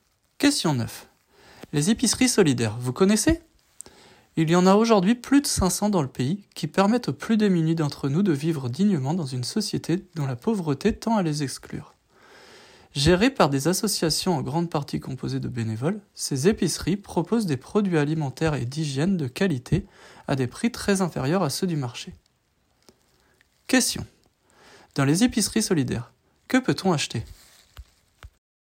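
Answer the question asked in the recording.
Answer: Des produits alimentaires et d'hygiène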